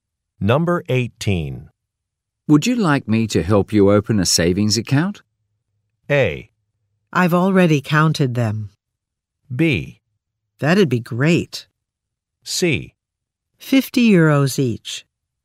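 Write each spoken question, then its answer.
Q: Would you like me to help you open a savings account?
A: B: That'd be great.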